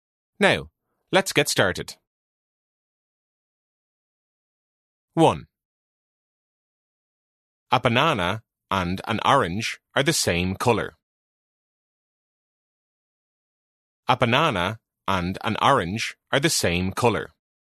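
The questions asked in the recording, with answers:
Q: A banana and an orange are the same colour.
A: False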